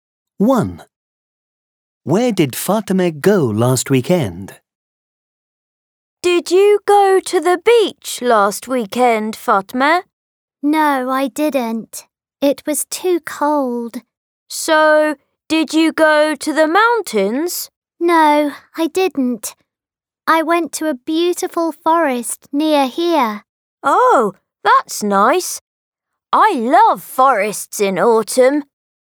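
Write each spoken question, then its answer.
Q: Where did Fatima go last weekend?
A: to a forest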